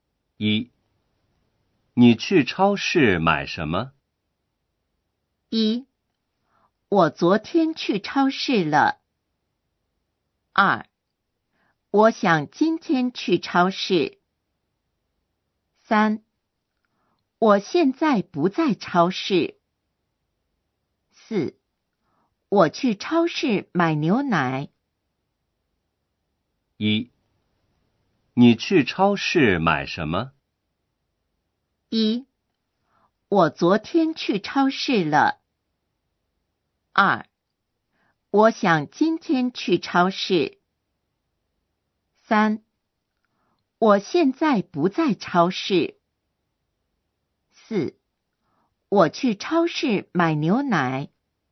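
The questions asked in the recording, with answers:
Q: 你去超市买什么?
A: 4: 我去超市买牛奶。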